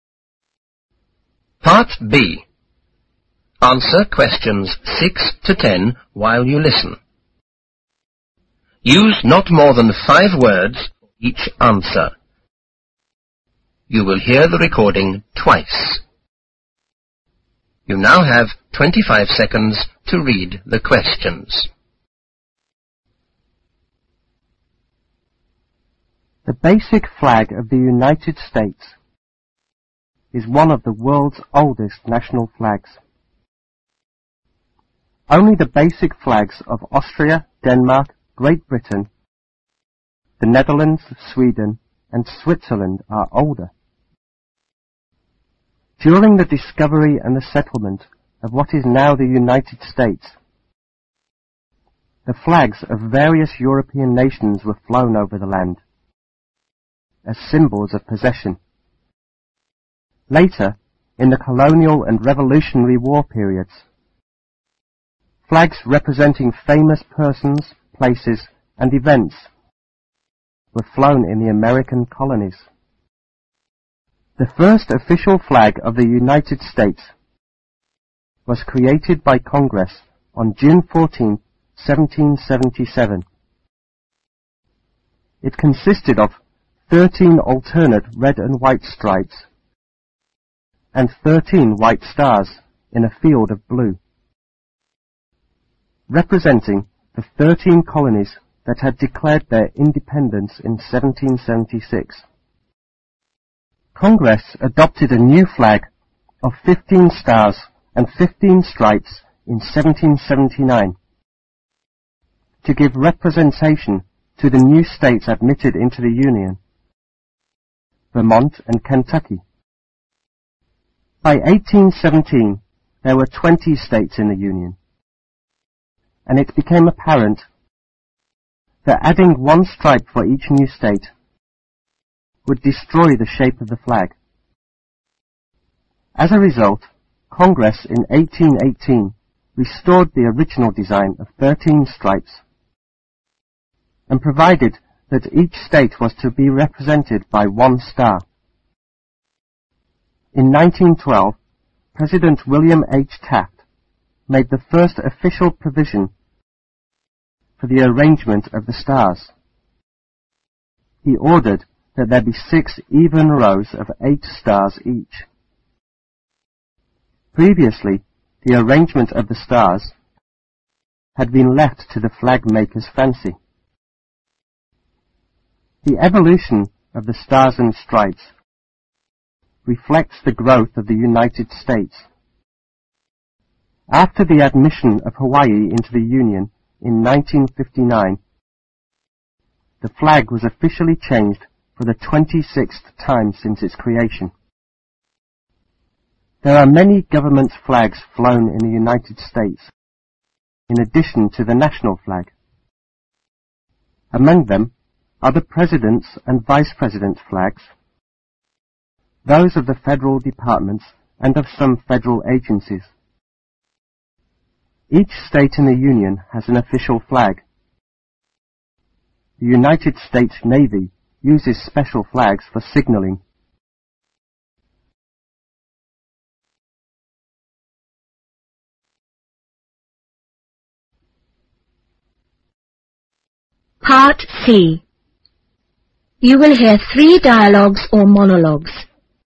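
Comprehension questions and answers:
Use not more than 5 words for each answer.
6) the flags of various nations flew over the land,as the symbol of what?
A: Possession

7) When was the first official flag of the United States created?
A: On June 14, 1777

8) By 1817,how many states were there in the Union?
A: 20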